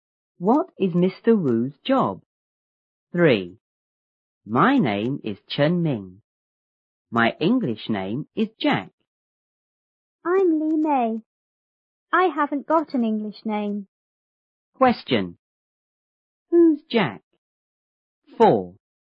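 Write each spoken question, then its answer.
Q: Who's Jack?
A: Chen Ming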